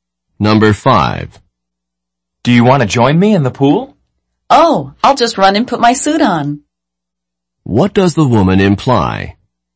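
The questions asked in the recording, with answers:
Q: What does the woman imply?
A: She will join him in the pool after putting on her swimsuit.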